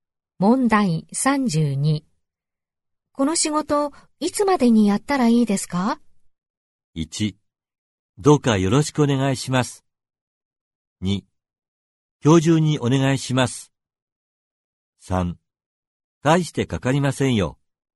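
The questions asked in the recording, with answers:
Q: この仕事、いつまでにやったらいいですか?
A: 2: 今日中にお願いします。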